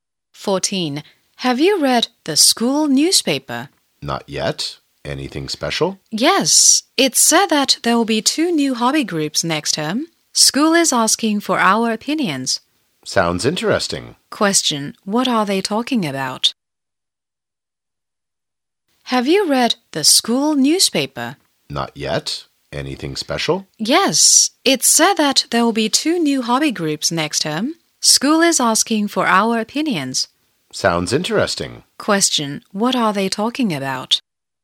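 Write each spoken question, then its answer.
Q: What are they talking about?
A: Two new hobby groups next term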